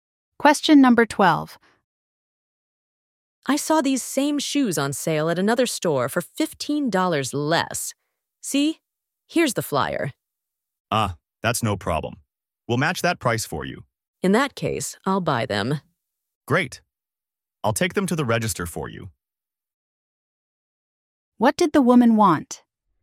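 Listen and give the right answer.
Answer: A price match for the shoes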